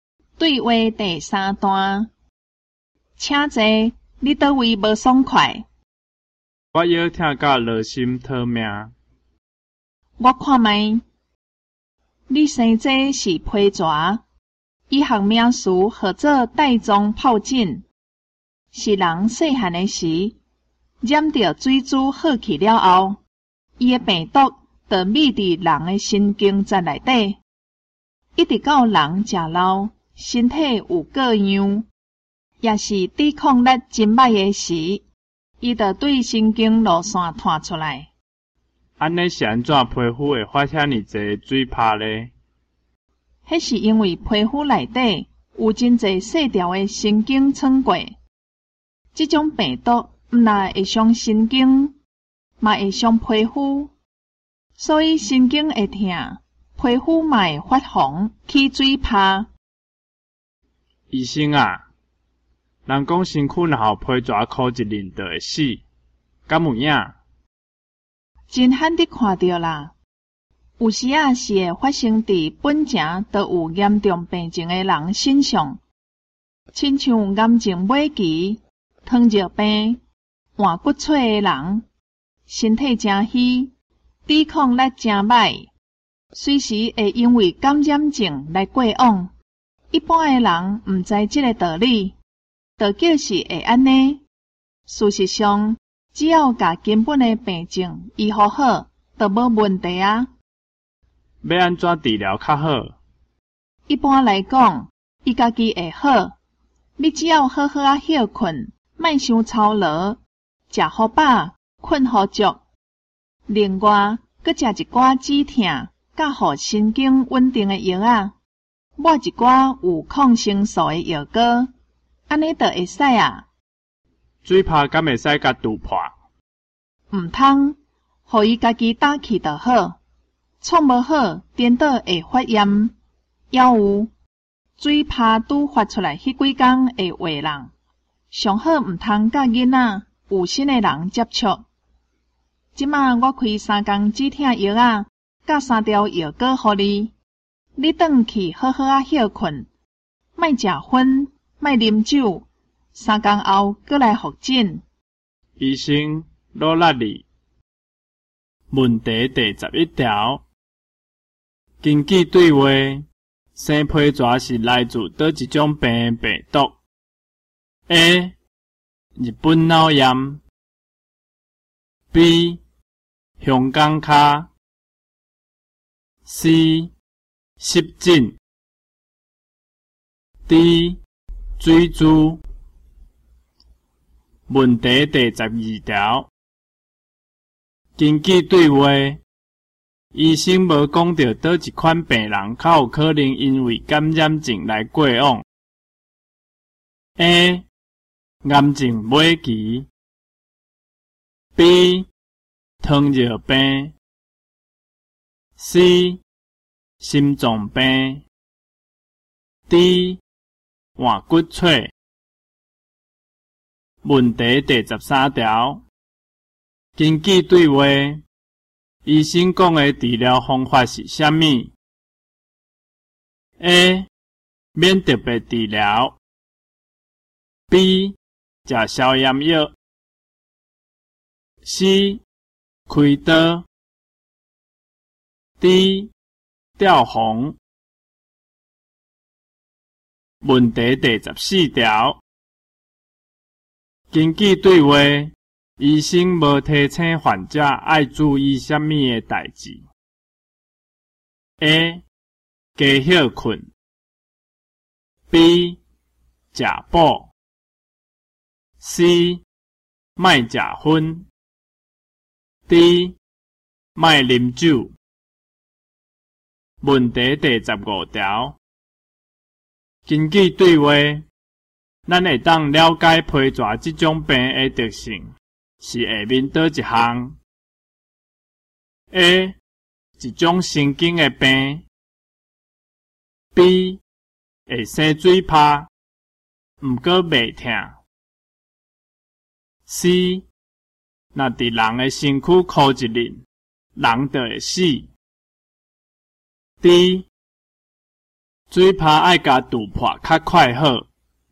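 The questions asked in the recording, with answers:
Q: 根据对话,生皮蛇是来自哪一种病病毒 ?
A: D: 水珠

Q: 根据对话,医生无讲到叨一款病人较有可能因为感染症来过往。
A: C: 心脏病

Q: 根据对话,医生讲的治疗方法是什么 ?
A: A: 免特别治疗

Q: 根据对话,医生无提醒患者爱注意什么的代志 ?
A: B: 食补

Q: 咱会当了解皮蛇这种病的特性,是下面叨一项 :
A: A: 一种神经的病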